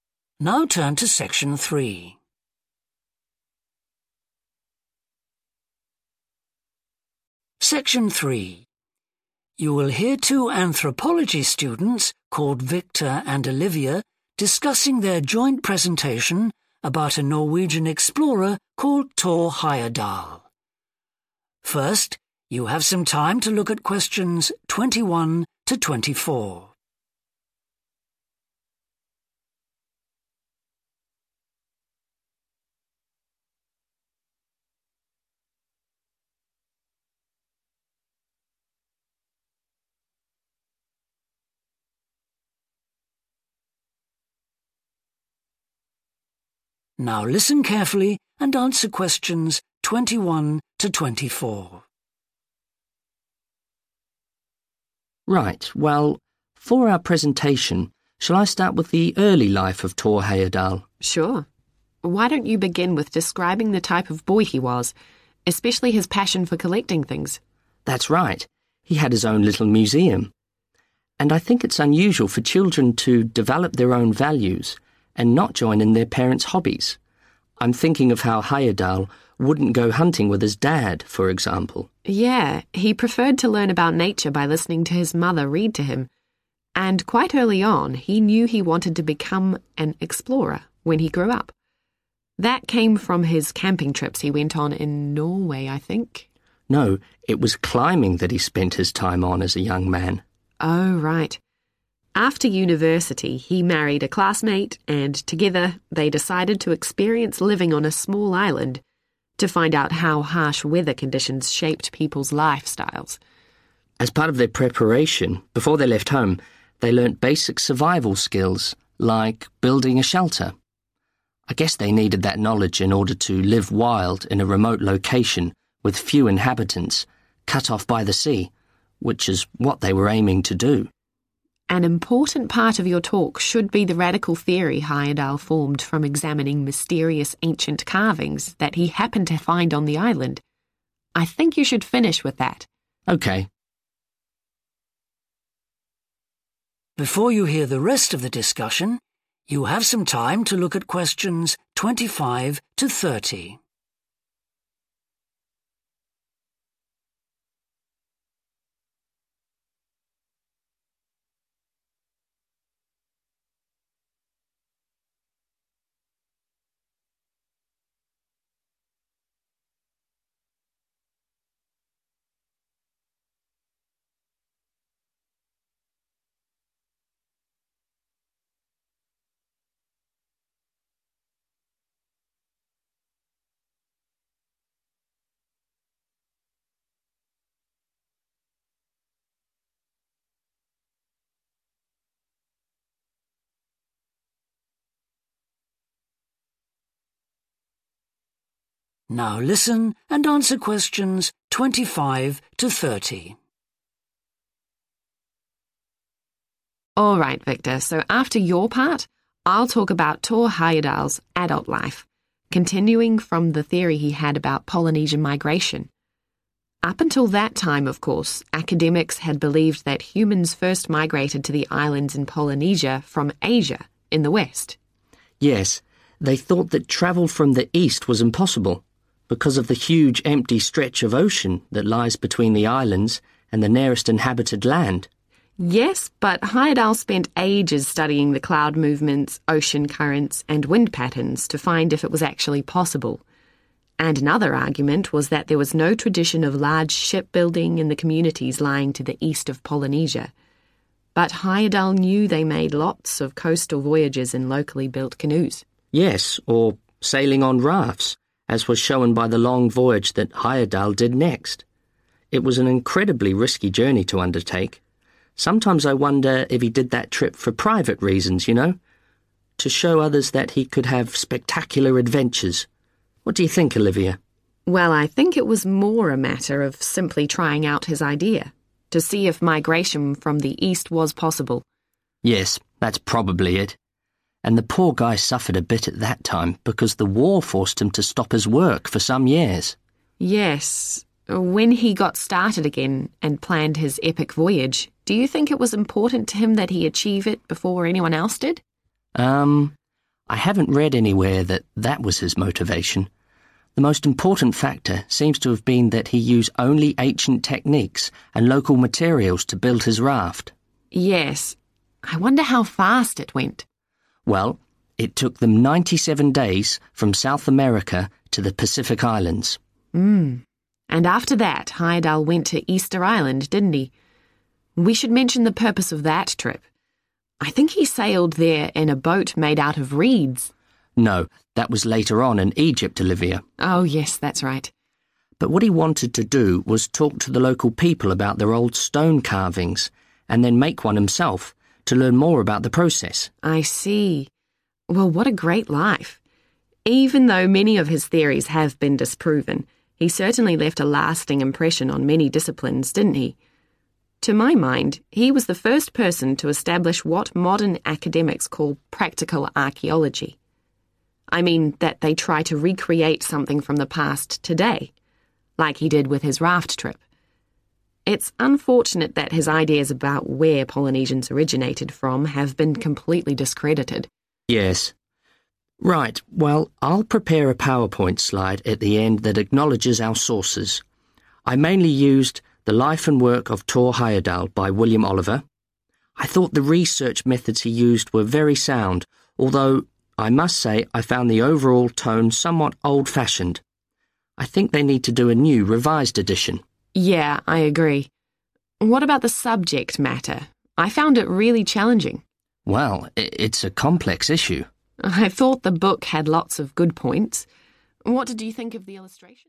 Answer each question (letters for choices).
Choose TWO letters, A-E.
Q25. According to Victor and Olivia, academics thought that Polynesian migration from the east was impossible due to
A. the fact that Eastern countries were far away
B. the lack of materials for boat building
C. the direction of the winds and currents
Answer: A

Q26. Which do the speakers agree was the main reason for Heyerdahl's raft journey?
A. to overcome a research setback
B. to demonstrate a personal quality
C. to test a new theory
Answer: C

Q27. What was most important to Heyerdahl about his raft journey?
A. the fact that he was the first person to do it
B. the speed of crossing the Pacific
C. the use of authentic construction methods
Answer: C

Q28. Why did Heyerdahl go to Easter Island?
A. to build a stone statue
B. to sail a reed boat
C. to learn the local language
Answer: A

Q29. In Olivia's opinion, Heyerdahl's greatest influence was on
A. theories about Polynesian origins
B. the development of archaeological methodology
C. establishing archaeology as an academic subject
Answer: B

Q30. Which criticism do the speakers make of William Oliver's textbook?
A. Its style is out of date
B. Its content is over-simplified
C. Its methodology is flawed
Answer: A